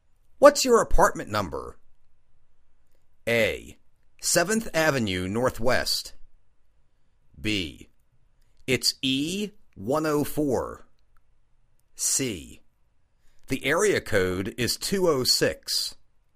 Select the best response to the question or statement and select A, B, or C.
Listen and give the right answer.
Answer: It's E-104.